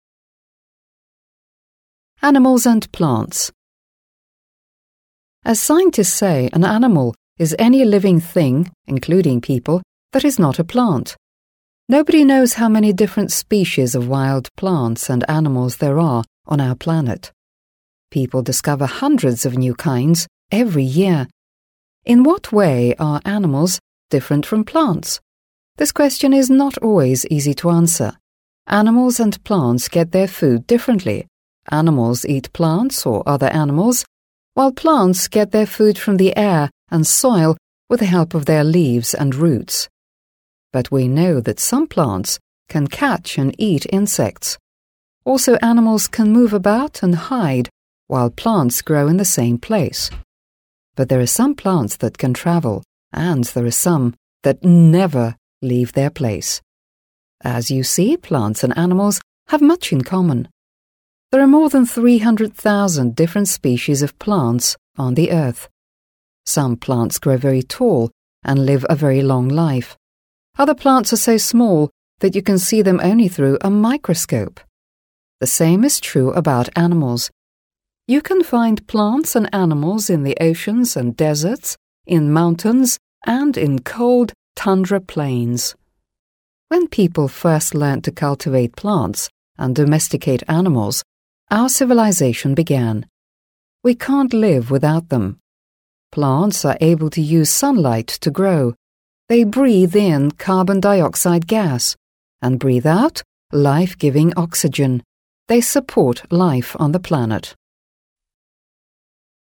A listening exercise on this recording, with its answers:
C. Answer the questions.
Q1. What do living things include?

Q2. Can we say that we know all the plants and animals that live on our planet?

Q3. In what way are plants and animals different?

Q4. Why is it not always true?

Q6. Why can't we live without plants and animals? In what ways do we use them?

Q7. Why is oxygen that plants "breathe out" so important for people?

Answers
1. Living things include animals, people, and plants.
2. No, we can't.
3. They get their food differently and move differently.
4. Because some plants can catch insects and travel, and some animals never leave their place.
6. They support life on the planet.
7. It is important because it is life-giving oxygen.

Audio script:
Animals and Plants
As scientists say, an animal is any living thing (including people) that is not a plant. Nobody knows exactly how many different species of wild plants and animals there are on our planet. People discover hundreds of new kinds every year. In what way are animals different from plants? This question is not always easy to answer. Animals and plants get their food differently: animals eat plants or other animals, while plants get their food from the air and soil with the help of their leaves and roots. But we know that some plants can catch and "eat" insects. Also animals can move about and hide while plants grow in the same place. But there are some plants that can travel and there are some animals that never leave their place. As you see plants and animals have much in common. There are more than 300,000 different species of plants on the Earth. Some plants grow very tall and live a very long life. Other plants are so small that you can see them only through a microscope ['maikrəskəup]. The same is true about animals. You can find plants and animals in the oceans and deserts, in mountains and in cold tundra ['tʌndrə] plains. When people first learned to cultivate ['kʌltɪveɪt] plants and domesticate animals, our civilization [,sɪvələr'zeɪʃn] began. We can't live without them. Plants are able to use sunlight to grow. They "breathe in" carbon dioxide1 gas and "breathe out" life-giving oxygen2. They support life on the planet.

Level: 7 класс